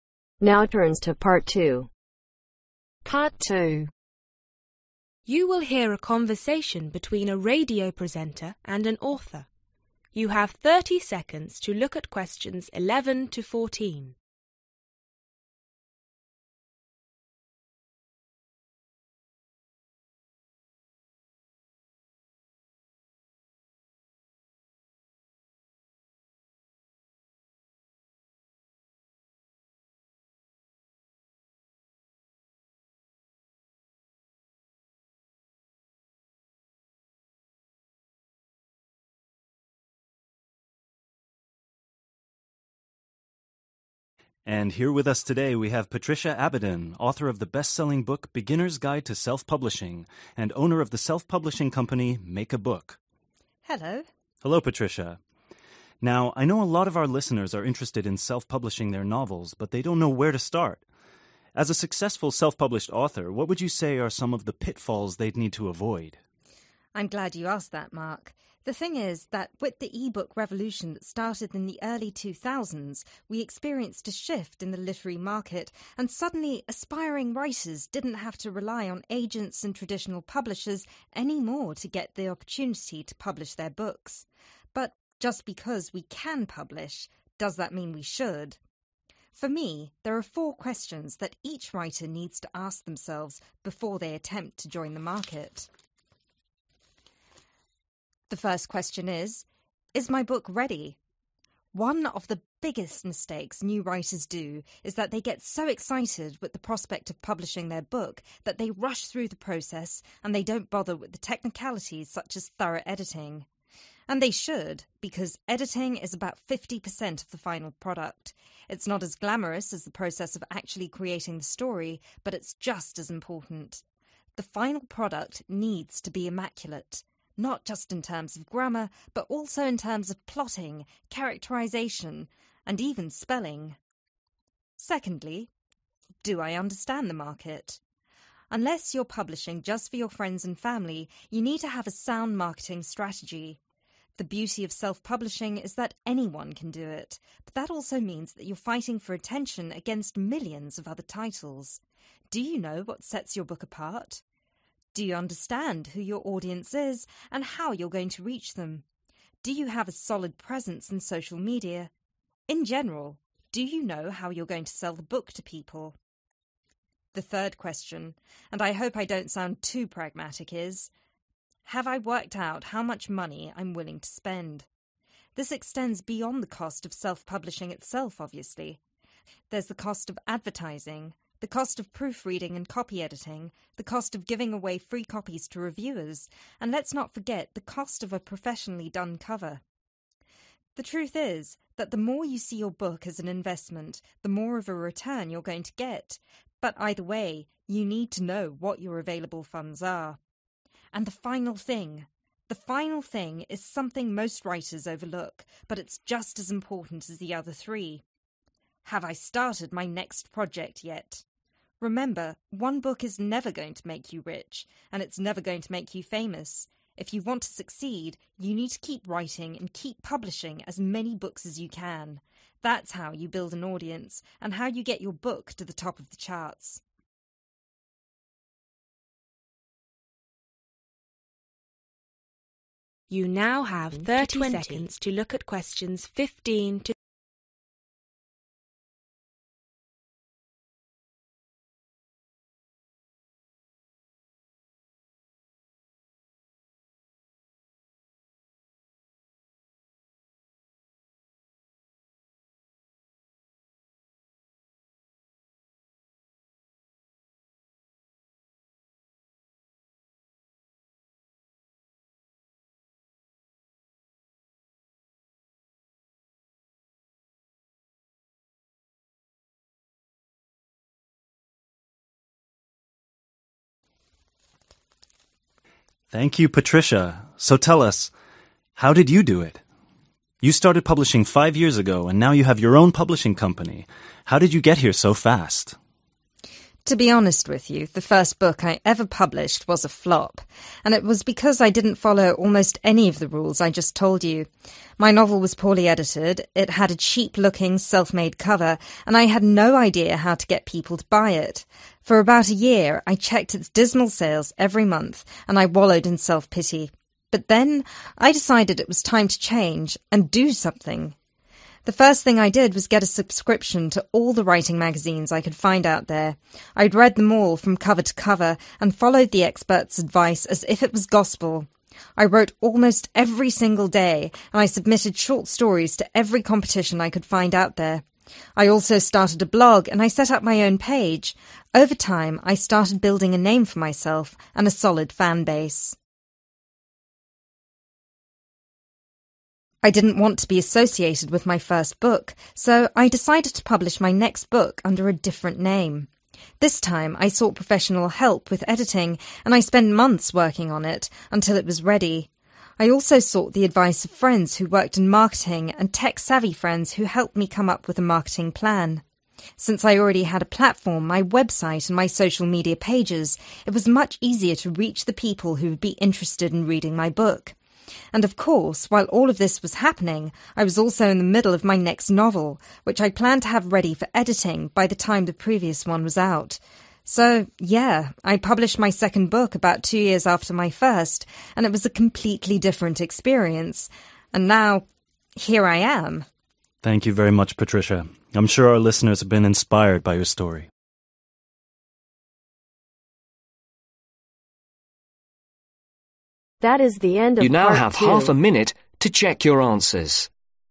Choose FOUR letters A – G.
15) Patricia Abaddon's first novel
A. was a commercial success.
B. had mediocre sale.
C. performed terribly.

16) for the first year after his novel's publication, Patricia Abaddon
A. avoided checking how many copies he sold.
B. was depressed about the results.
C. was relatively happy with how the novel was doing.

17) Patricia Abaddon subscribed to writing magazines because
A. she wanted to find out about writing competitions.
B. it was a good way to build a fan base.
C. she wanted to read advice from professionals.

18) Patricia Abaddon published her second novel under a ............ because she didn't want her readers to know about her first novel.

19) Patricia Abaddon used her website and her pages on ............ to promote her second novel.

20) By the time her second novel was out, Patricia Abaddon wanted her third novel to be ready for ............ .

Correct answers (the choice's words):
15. performed terribly.
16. was depressed about the results.
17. she wanted to read advice from professionals.
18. different name
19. social media
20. editing